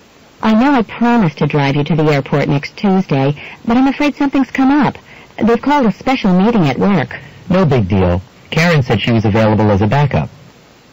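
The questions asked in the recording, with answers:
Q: What does the man mean?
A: He can get a ride from Karen instead; it's not a problem.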